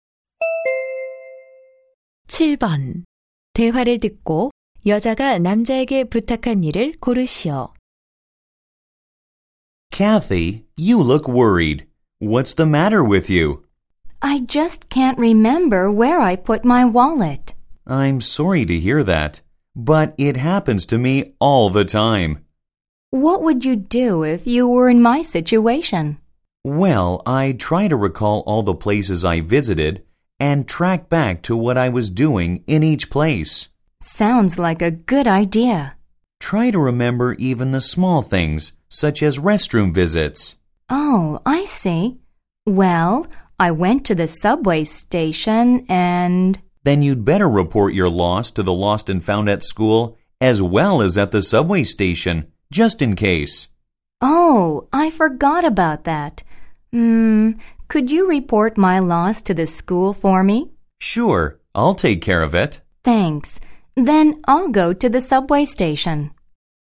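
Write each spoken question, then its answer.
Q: 대화를 듣고 여자가 남자에게 부탁한 일을 고르시오.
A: 학교 분실물 센터에 지갑 분실 신고하기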